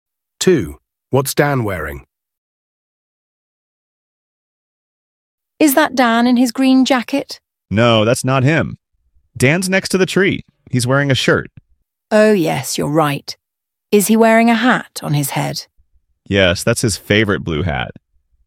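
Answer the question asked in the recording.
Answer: A shirt and a blue hat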